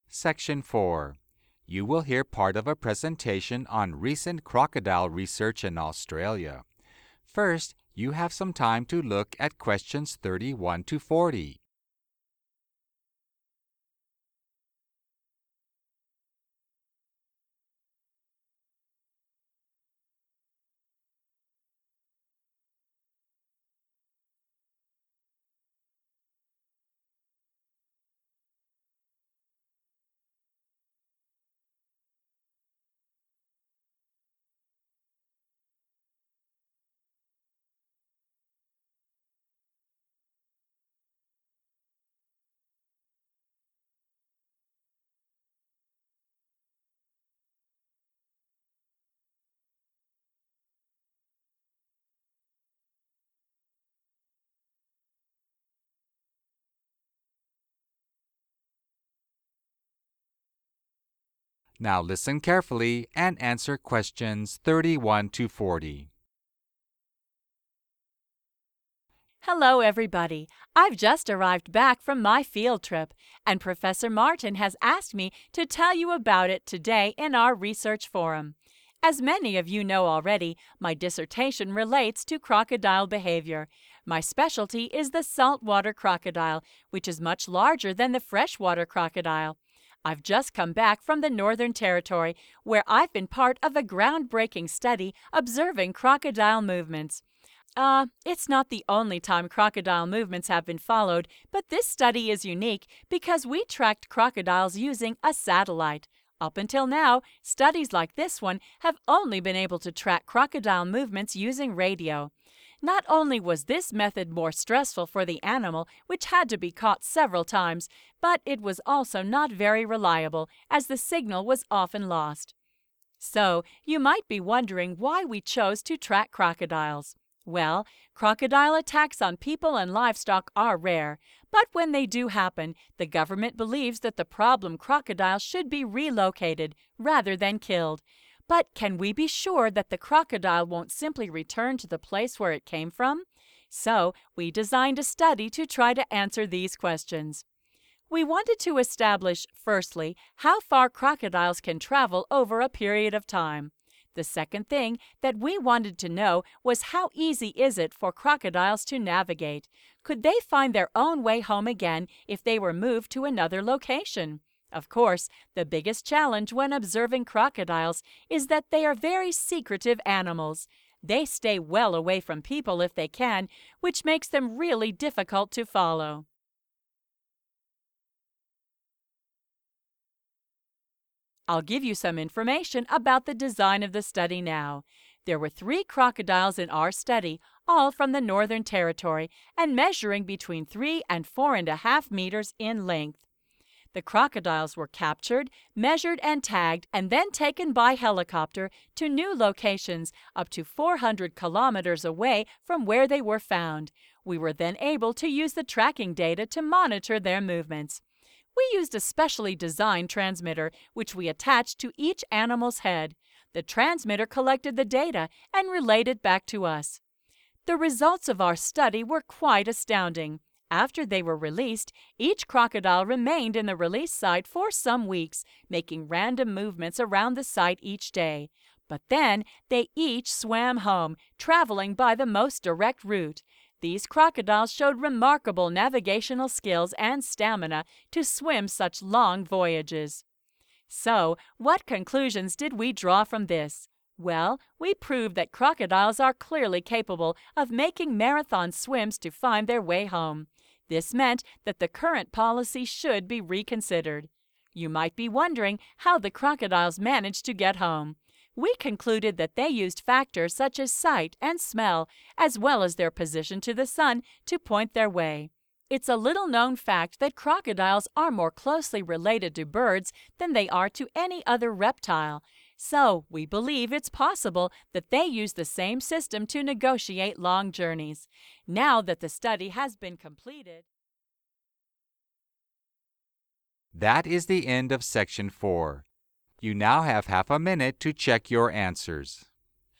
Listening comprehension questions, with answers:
Complete the notes below. Write ONE WORD ONLY for each answer.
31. Significance of study: unique because it was the first time a 31. ......................... had been used to track crocodiles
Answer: satellite

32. done using 32. ........................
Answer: radio

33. stressful method, also unreliable due to loss of the 33. ........................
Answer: signal

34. How easily can crocodiles 34. ........................ ?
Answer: navigate

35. Challenge: crocodiles are difficult to observe because they avoid 35. ........................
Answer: people

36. method: crocodiles were measured and tagged then relocated using a 36. ........................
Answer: helicopter

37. monitoring: scientists got data from a transmitter located on the crocodile's 37. ........................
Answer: head

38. then took the most 38. ........................ way home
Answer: direct

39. i) their own senses and the position of the 39. ........................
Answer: sun

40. ii) a similar system to 40. ........................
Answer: birds